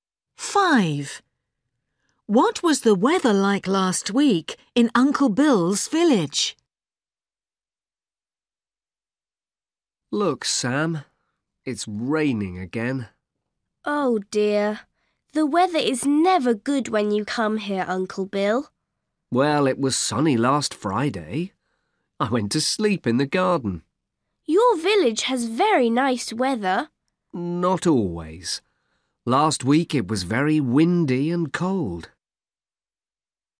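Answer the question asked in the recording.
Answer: Very windy and cold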